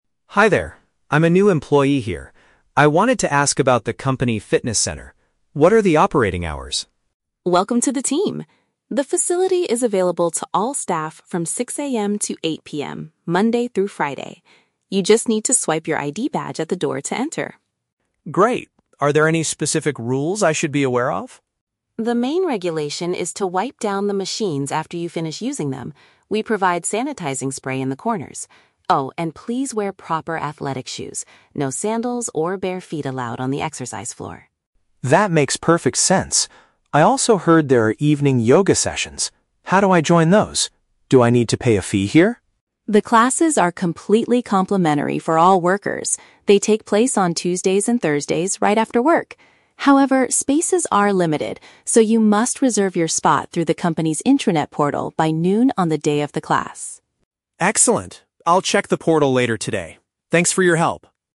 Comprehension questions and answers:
Listen to the conversation between an employee and a receptionist, then choose the correct answer (A, B, or C).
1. How can staff members access the company's fitness center?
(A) By scanning their official employee identification card.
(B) By paying a monthly membership fee to the receptionist.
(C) By booking a specific time slot on the internet.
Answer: (A) By scanning their official employee identification card.

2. What is one of the mandatory rules for using the workout area?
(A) Users must wear special indoor sandals.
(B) Users are required to clean the equipment after exercising.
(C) Users should bring their own clean towels from home.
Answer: (B) Users are required to clean the equipment after exercising.

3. What must Dan do if he wants to participate in a yoga class?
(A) Pay the yoga instructor directly before the session begins.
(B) Register online before the middle of the day.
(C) Fill out a medical form at the wellness center.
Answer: (B) Register online before the middle of the day.

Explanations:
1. Nina says, "You just need to swipe your ID badge at the door to enter." Option A paraphrases "swipe your ID badge" as "scanning their official employee identification card."
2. Nina instructs Dan to "wipe down the machines after you finish using them." Option B uses synonyms ("clean the equipment") to accurately reflect this rule.
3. Nina explains that Dan must "reserve your spot through the company's intranet portal by noon." Option B paraphrases "intranet portal" as "online" and "by noon" as "before the middle of the day."

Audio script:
I'm a new employee here. I wanted to ask about the company fitness center. What are the operating hours?
Nina: Welcome to the team! The facility is available to all staff from 6 AM to 8 PM, Monday through Friday. You just need to swipe your ID badge at the door to enter.
Dan: Great. Are there any specific rules I should be aware of?
Nina: The main regulation is to wipe down the machines after you finish using them. We provide sanitizing spray in the corners. Oh, and please wear proper athletic shoes—no sandals or bare feet allowed on the exercise floor.
Dan: That makes perfect sense. I also heard there are evening yoga sessions. How do I join those? Do I need to pay a fee here?
Nina: The classes are completely complimentary for all workers! They take place on Tuesdays and Thursdays right after work. However, spaces are limited, so you must reserve your spot through the company's intranet portal by noon on the day of the class.

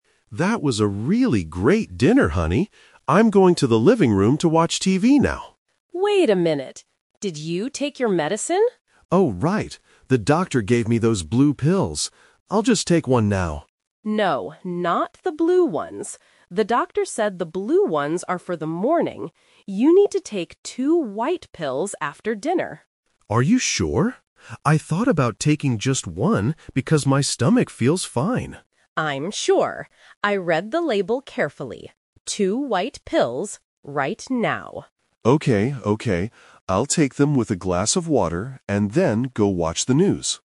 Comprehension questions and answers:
Listen to the conversation between a husband and wife. Choose the correct answer (A, B, or C) for each question.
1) Which medicine does the husband need to take right now?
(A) One blue pill.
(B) Two white pills.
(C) Two blue pills.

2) When is the husband supposed to take the blue medicine?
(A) In the morning.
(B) After dinner.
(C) Before going to sleep.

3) What is the husband going to do next?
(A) Eat his dinner.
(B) Call his doctor.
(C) Watch some television.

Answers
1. (B) Two white pills.
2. (A) In the morning.
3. (C) Watch some television.

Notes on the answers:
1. The wife clearly tells him, "You need to take two white pills after dinner." Trap A is wrong (The Twist): The husband initially says "I'll just take one [blue pill] now", but his wife stops him because that is the wrong medicine for the evening. Trap C is wrong: Two blue pills are never mentioned as a dosage in the conversation.
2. The wife says, "The doctor said the blue ones are for the morning." Trap B is wrong: "After dinner" is the correct time for the white pills, not the blue ones. Trap C is wrong: Taking medicine before sleep is a plausible idea, but it is not mentioned in the listening.
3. At the beginning, the husband says he is going to "watch TV," and at the end, he confirms he will take the pills and "then go watch the news" (news is a TV program). Trap A is wrong: He says "That was a really great dinner," which means they have already finished eating. Trap B is wrong: The doctor is mentioned, but the husband does not say he will call him.

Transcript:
Husband: That was a really great dinner, honey. I'm going to the living room to watch TV now.
Wife: Wait a minute. Did you take your medicine?
Husband: Oh, right. The doctor gave me those blue pills. I'll just take one now.
Wife: No, not the blue ones. The doctor said the blue ones are for the morning. You need to take two white pills after dinner.
Husband: Are you sure? I thought about taking just one because my stomach feels fine.
Wife: I'm sure. I read the label carefully. Two white pills, right now.
Husband: Okay, okay. I'll take them with a glass of water, and then go watch the news.

